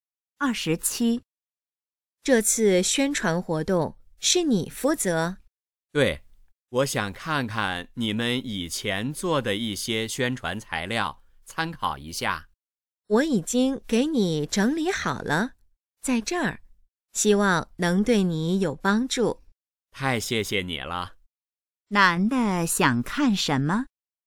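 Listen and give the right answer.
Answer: 以前的宣传材料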